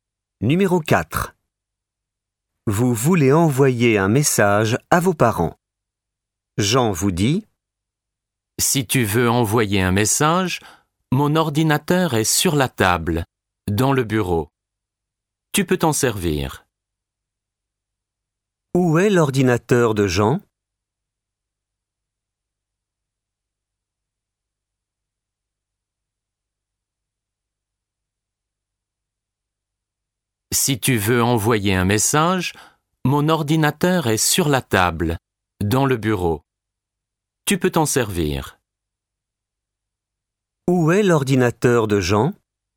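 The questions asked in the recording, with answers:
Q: Où est l'ordinateur de Jean ?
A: Sur la table, dans le bureau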